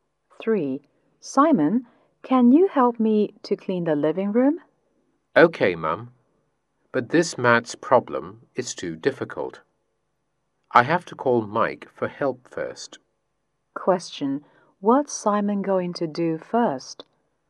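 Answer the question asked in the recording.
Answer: Call Mike for help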